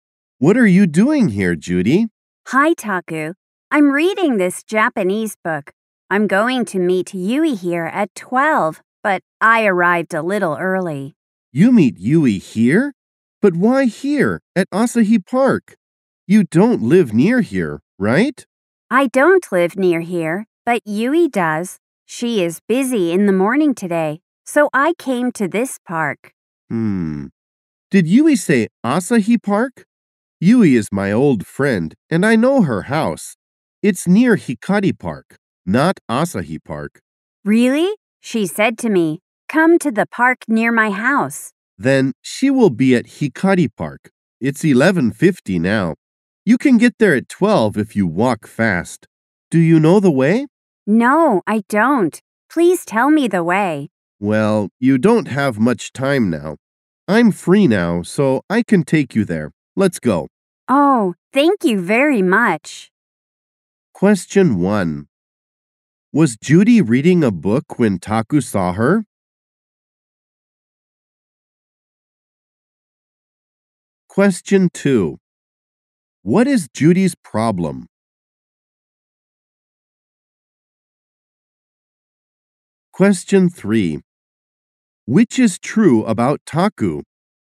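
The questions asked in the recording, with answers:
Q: Was Judy reading a book when Taku saw her?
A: Yes, she was.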